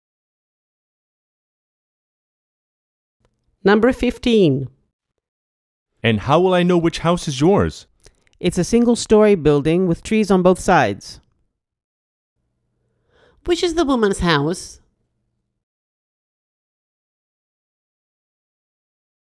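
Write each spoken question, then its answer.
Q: Which is the woman's house?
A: A single-story house with trees on both sides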